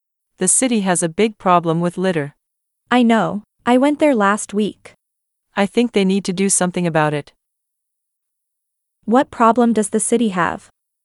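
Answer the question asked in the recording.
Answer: A big problem with litter.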